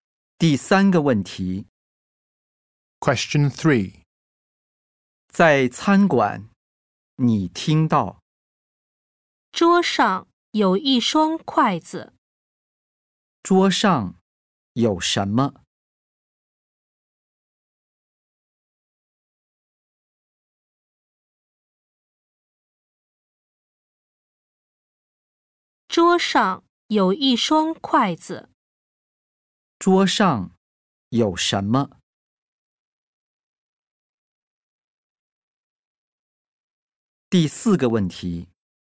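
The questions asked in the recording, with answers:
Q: 桌上有什么?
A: 一双筷子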